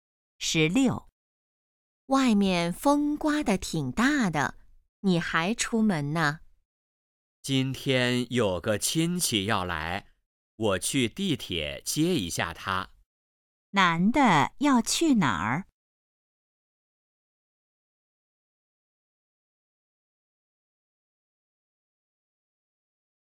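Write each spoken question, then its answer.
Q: 男的要去哪儿?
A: 地铁站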